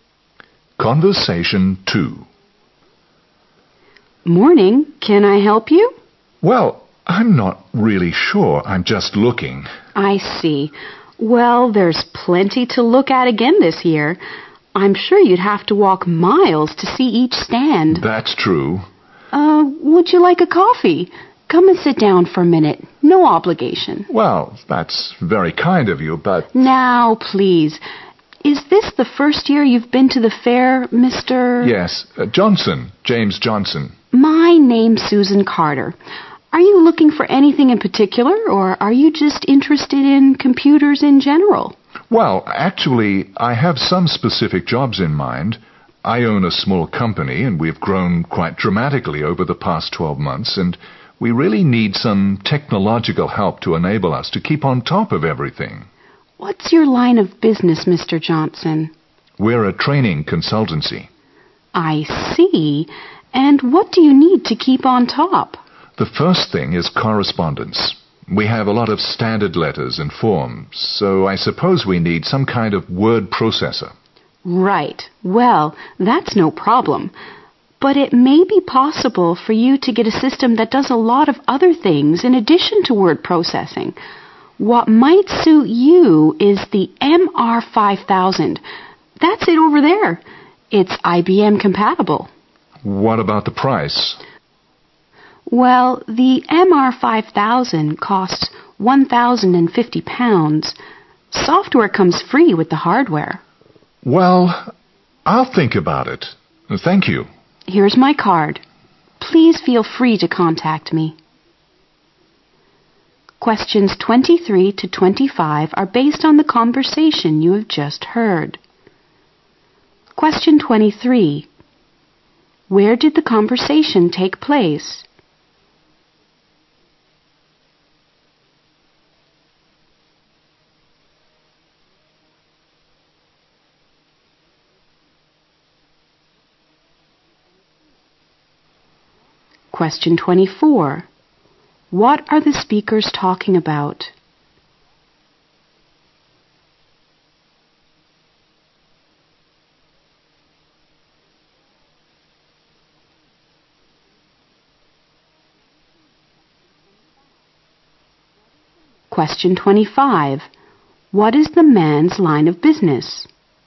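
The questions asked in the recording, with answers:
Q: Where did the conversation take place?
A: At a computer fair

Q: What are the speakers talking about?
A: Buying a computer system for the man's company

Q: What is the man's line of business?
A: Training consultancy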